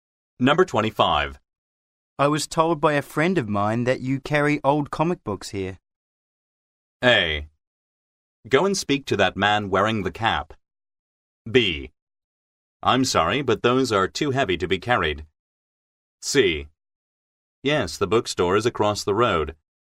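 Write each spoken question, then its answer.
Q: I was told by a friend of mine that you carry old comic books here.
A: A: Go and speak to that man wearing the cap.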